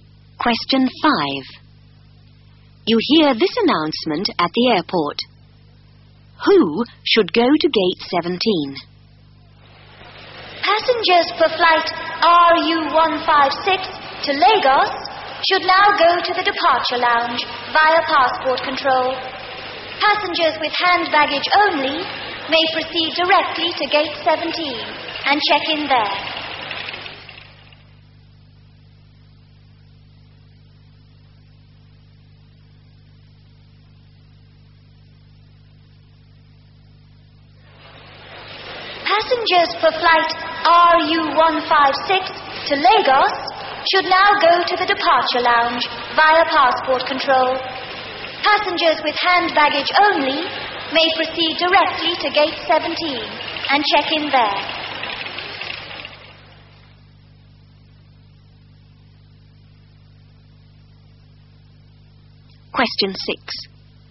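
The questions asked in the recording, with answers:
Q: Who should go to gate 17?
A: Passengers for flight RU156 with hand baggage only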